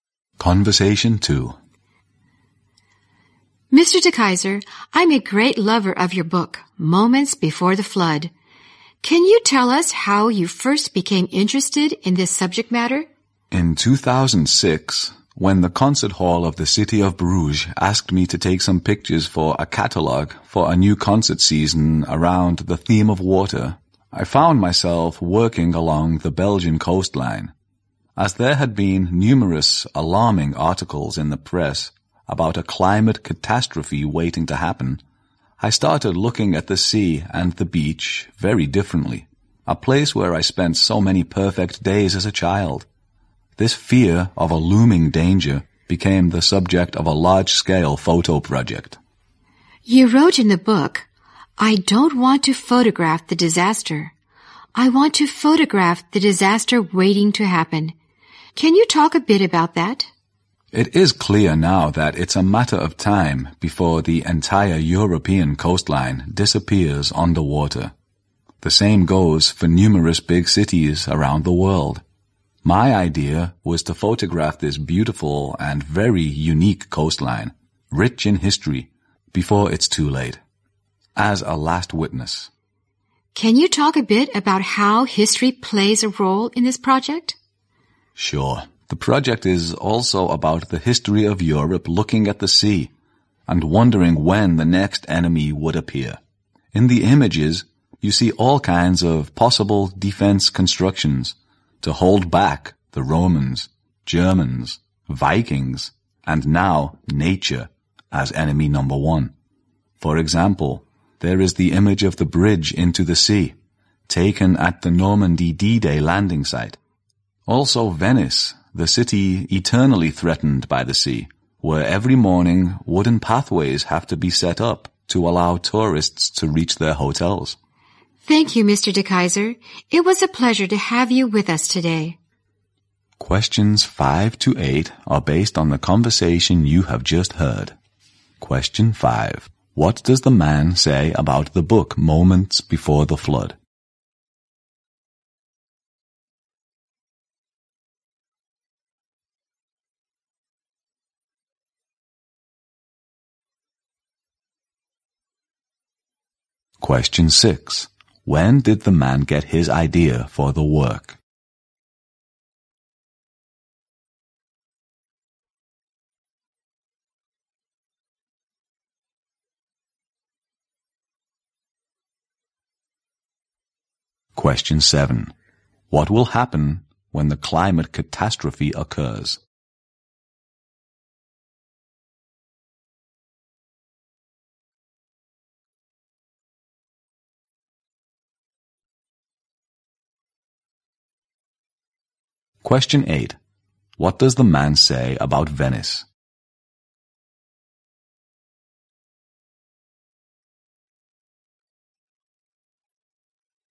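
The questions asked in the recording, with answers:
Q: When did the man get his idea for the work?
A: In 2006, while taking pictures along the Belgian coastline for a concert hall catalog

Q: What will happen when the climate catastrophe occurs?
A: The entire European coastline will disappear underwater

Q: What does the man say about Venice?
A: It is eternally threatened by the sea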